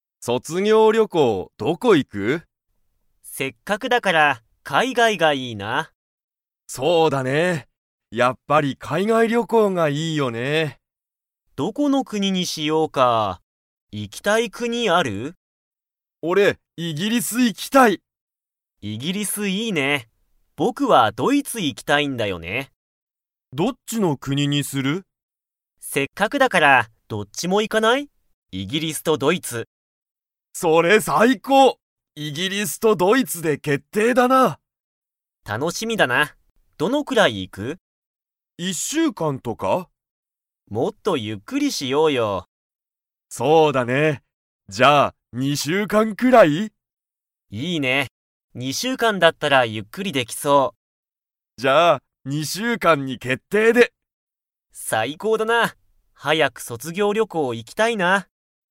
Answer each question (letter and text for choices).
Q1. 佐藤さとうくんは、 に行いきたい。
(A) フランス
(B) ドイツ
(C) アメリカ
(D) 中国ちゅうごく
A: (B) ドイツ

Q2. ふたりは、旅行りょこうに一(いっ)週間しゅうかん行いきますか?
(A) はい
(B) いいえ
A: (B) いいえ

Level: Level 4